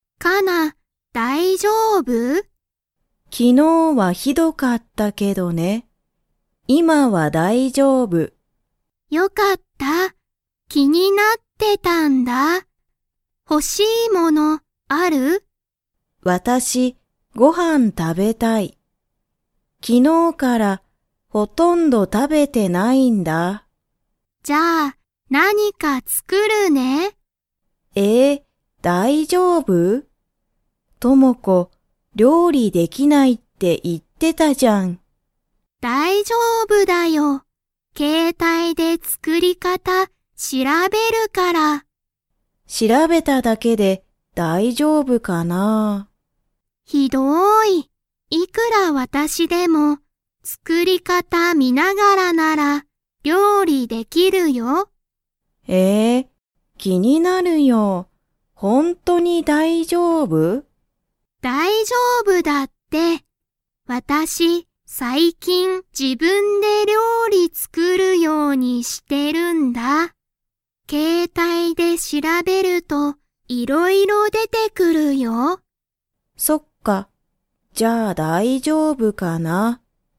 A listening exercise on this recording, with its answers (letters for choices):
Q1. 加奈かなさんは、何なにがしたいですか?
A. テレビを見みたい。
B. ごはんを食たべたい。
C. 友子ともこと話はなしたい。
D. すこし寝ねたい。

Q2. 友子ともこは最近さいきん料理りょうりを 。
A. している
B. 全然ぜんぜんしていない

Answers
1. B
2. A

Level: Level 3